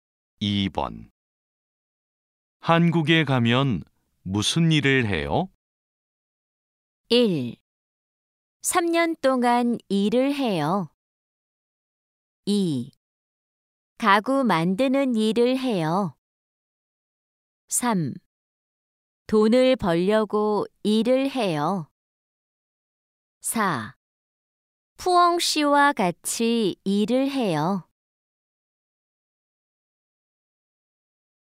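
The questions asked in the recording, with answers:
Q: 한국에 가면 무슨 일을 해요?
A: 2: 가구 만드는 일을 해요.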